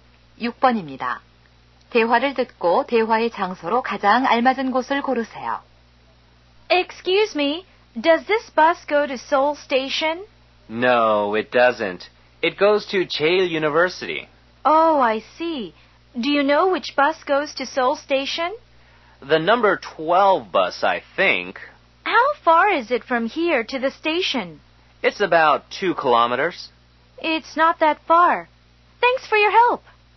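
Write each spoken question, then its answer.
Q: 대화를 듣고 대화의 장소로 가장 알맞은 곳을 고르세요.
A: 버스 정류장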